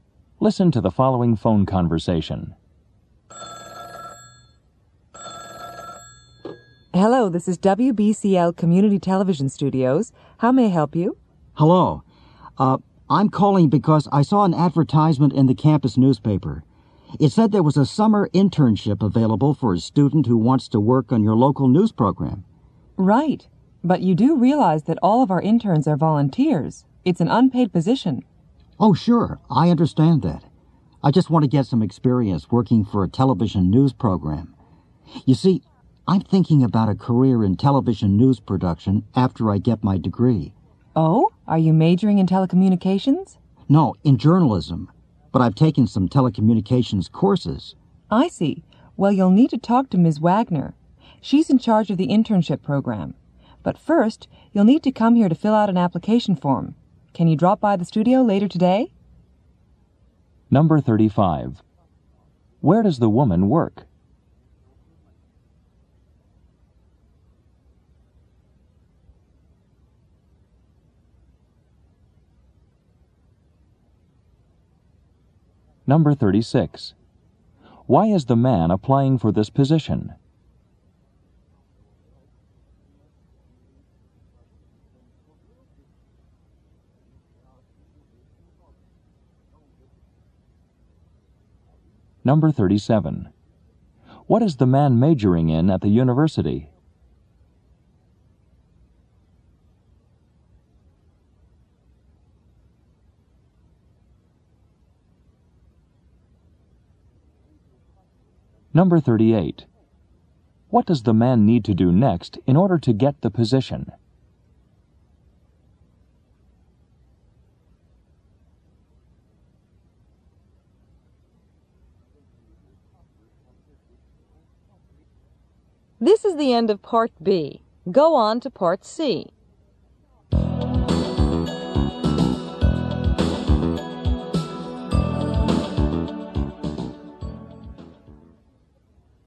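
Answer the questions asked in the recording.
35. At a community television studio (WBCL)
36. To get experience working for a television news program
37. Journalism
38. Go to the studio to fill out an application form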